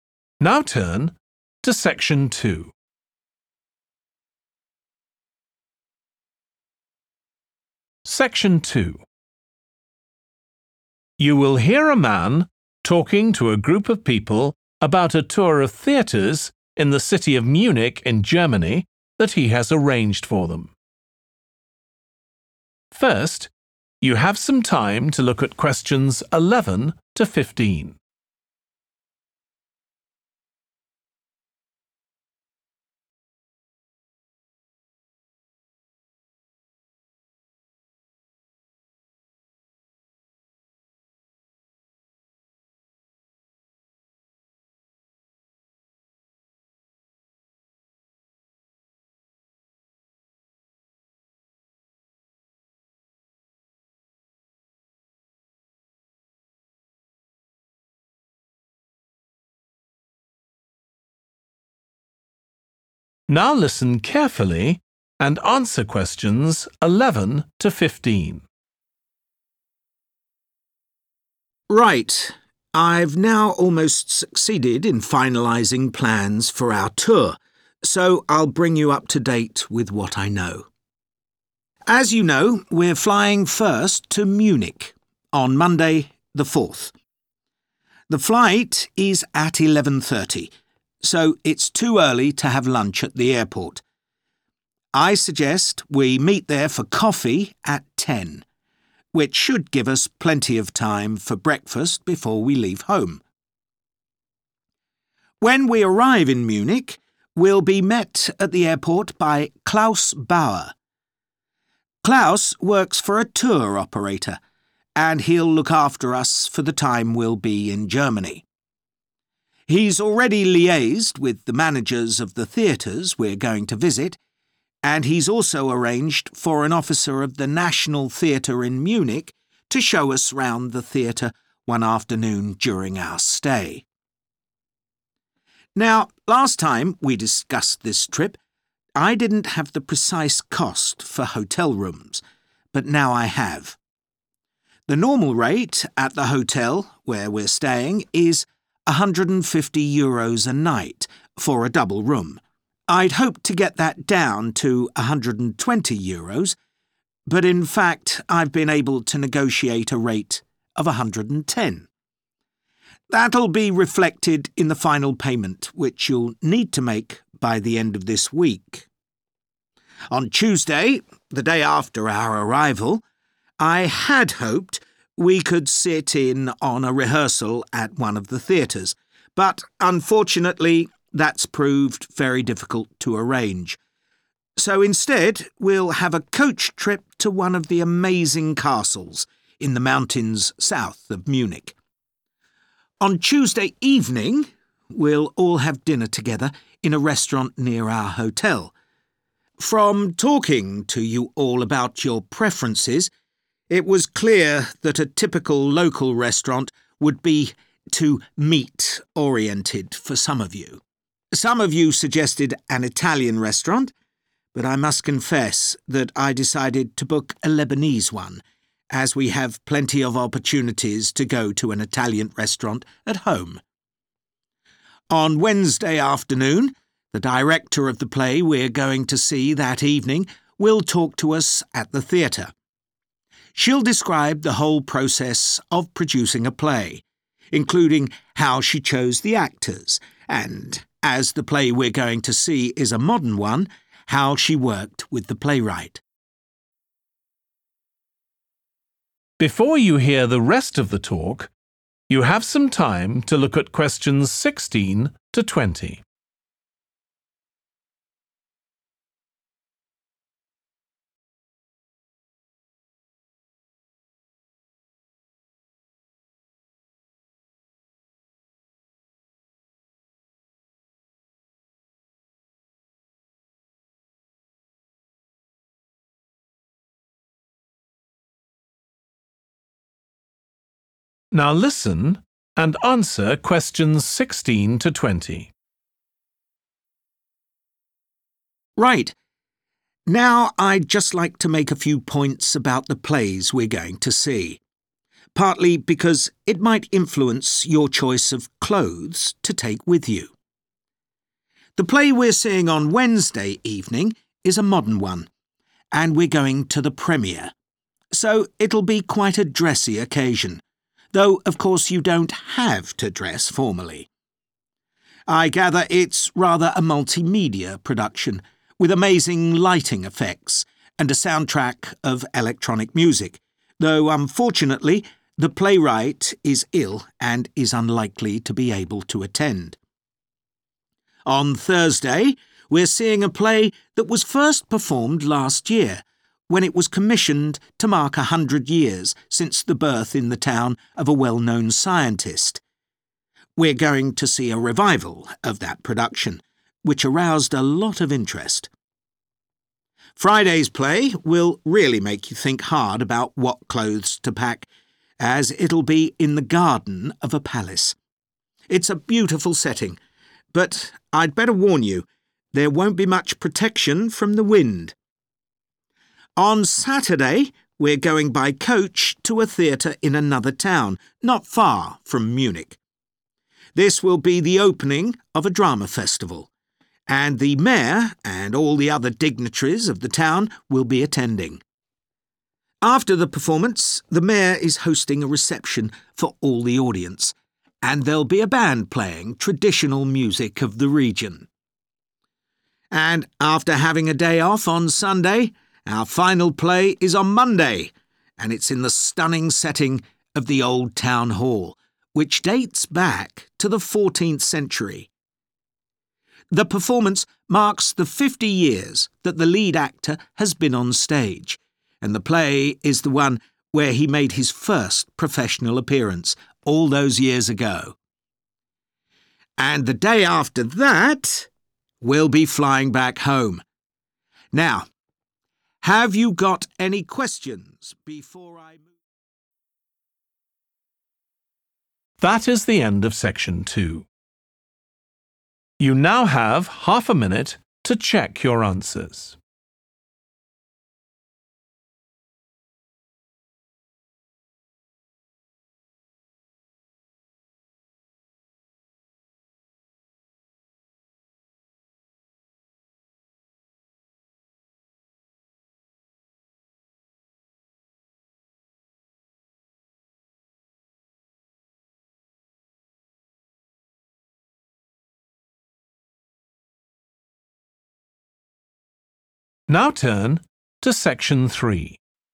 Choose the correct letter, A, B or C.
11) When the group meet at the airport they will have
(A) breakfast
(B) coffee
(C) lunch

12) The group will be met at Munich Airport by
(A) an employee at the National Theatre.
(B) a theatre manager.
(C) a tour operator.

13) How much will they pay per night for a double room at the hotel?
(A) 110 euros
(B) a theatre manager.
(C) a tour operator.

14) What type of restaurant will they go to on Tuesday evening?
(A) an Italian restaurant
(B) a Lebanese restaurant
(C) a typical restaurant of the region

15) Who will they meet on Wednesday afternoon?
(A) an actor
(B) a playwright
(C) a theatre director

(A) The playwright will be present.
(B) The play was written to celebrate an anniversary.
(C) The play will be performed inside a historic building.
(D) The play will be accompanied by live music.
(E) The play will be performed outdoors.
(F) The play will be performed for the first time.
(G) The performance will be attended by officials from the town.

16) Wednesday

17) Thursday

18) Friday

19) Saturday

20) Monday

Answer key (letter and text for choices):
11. (B) coffee
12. (C) a tour operator.
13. (A) 110 euros
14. (B) a Lebanese restaurant
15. (C) a theatre director
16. (F) The play will be performed for the first time.
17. (B) The play was written to celebrate an anniversary.
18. (E) The play will be performed outdoors.
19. (G) The performance will be attended by officials from the town.
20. (C) The play will be performed inside a historic building.